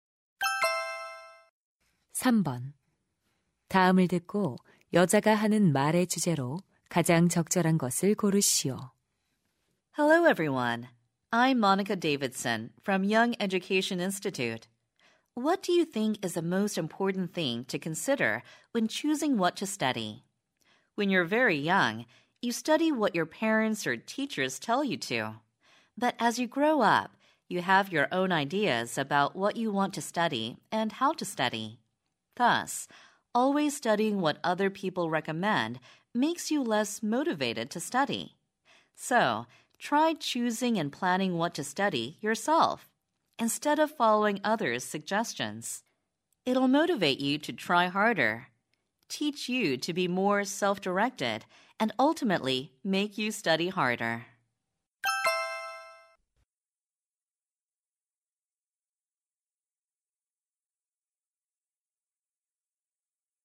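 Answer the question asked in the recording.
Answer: 공부할 것을 스스로 선택하고 계획하라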